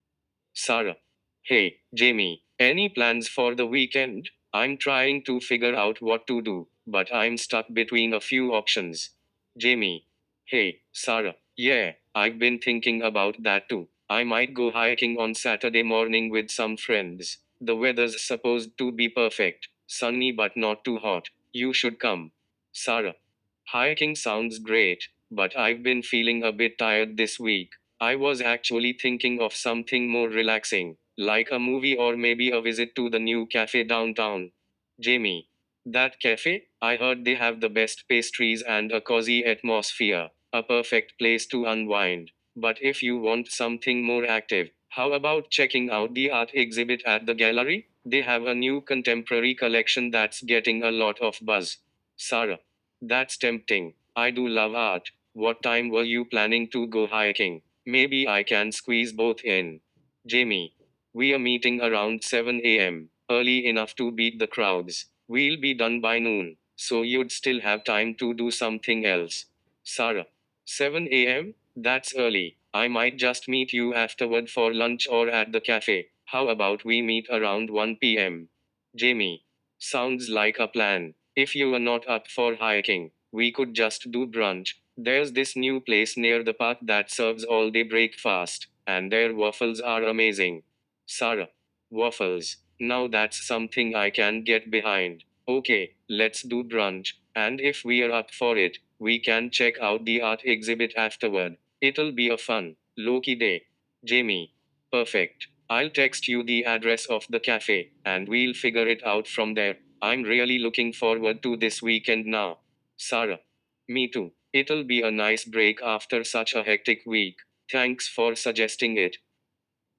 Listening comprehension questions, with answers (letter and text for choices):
After the audio, you will be asked 10 multiple-choice questions based on the conversation. Each question has four answer options. Choose the best answer that corresponds to what you heard in the conversation.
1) What activity is Jamie planning to do on Saturday morning?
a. Going to the art gallery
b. Hiking with friends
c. Visiting a café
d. Going to the movies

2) What reason does Sarah give for not wanting to go hiking?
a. She's not feeling well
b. She's feeling tired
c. She prefers watching movies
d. She has other plans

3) What alternative activity does Sarah suggest?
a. Going to a new café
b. Going to a music concert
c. Playing tennis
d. Going to a park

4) What does Jamie mention about the new café?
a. It's crowded on weekends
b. It has great coffee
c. It's known for its pastries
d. It's expensive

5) What does Jamie propose as an alternative to hiking if Sarah doesn't join?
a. Going to the movies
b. Brunch at a café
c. Visiting the art gallery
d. Attending a concert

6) At what time does Jamie plan to meet friends for hiking?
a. 6 AM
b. 7 AM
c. 8 AM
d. 9 AM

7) When does Sarah suggest meeting Jamie if she skips hiking?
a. 11 AM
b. 12 PM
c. 1 PM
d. 2 PM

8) What food does Jamie mention while talking about brunch?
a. Pancakes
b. French toast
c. Waffles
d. Omelette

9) What event does Sarah express interest in after brunch?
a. A music concert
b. A play at the theater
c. A shopping trip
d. An art exhibit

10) What does Sarah say about her week?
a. It was stressful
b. It was productive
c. It was boring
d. It was fun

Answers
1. b. Hiking with friends
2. b. She's feeling tired
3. a. Going to a new café
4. c. It's known for its pastries
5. b. Brunch at a café
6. b. 7 AM
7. c. 1 PM
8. c. Waffles
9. d. An art exhibit
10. a. It was stressful

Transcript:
[Sarah]
Hey, Jamie! Any plans for the weekend? I'm trying to figure out what to do, but I'm stuck between a few options.
[Jamie]
Hey, Sarah! Yeah, I've been thinking about that too. I might go hiking on Saturday morning with some friends. The weather's supposed to be perfect, sunny but not too hot. You should come!
[Sarah]
Hiking sounds great, but I've been feeling a bit tired this week. I was actually thinking of something more relaxing, like a movie or maybe a visit to the new café downtown.
[Jamie]
I heard they have the best pastries and a cozy atmosphere. A perfect place to unwind! But if you want something more active, how about checking out the art exhibit at the gallery? They have a new contemporary collection that's getting a lot of buzz.
[Sarah]
Hmm, that's tempting. I do love art. What time were you planning to go hiking? Maybe I can squeeze both in.
[Jamie]
We're meeting around 7 AM, early enough to beat the crowds. We'll be done by noon, so you'd still have time to do something else.
[Sarah]
That's early! I might just meet you afterward for lunch or at the café. How about we meet around 1 PM?
[Jamie]
Sounds like a plan! If you're not up for hiking, we could just do brunch. There's this new place near the park that serves all-day breakfast, and their waffles are amazing.
[Sarah]
Now that's something I can get behind. Okay, let's do brunch. And if we're up for it, we can check out the art exhibit afterward. It'll be a fun, low-key day.
[Jamie]
Perfect! I'll text you the address of the café, and we'll figure it out from there. I'm really looking forward to this weekend now!
[Sarah]
Me too! It'll be a nice break after such a hectic week. Thanks for suggesting it.